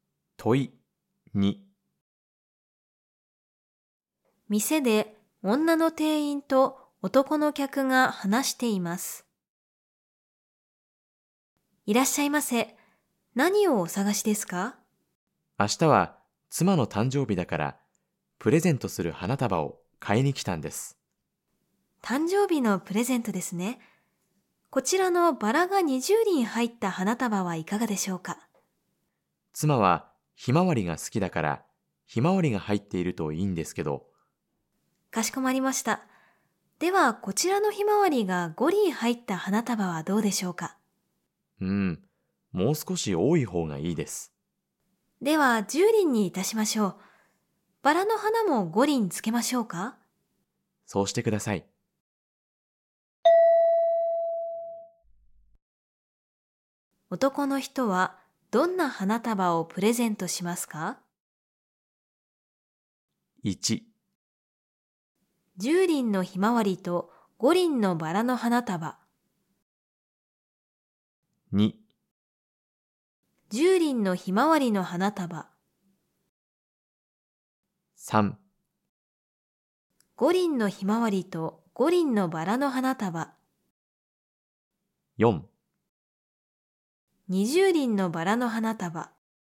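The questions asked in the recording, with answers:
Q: 男の人はどんな花束をプレゼントしますか。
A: 1: 10輪のひまわりと5輪のバラの花束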